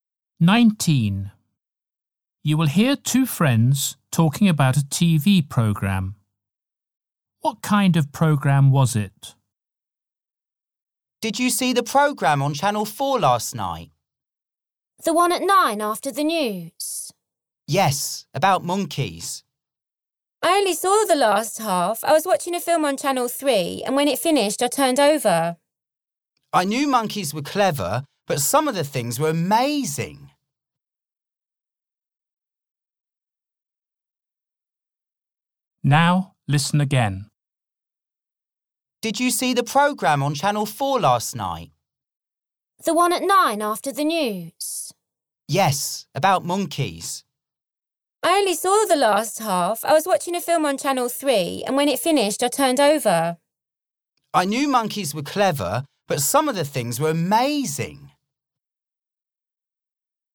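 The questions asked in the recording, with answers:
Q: What kind of program was it?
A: A programme about monkeys (nature)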